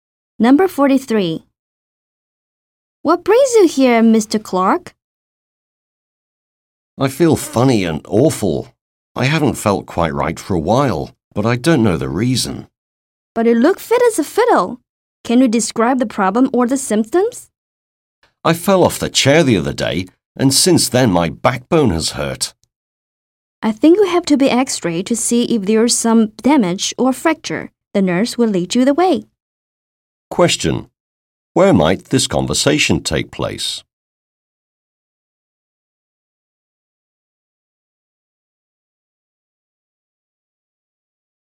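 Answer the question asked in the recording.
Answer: At a hospital or doctor's clinic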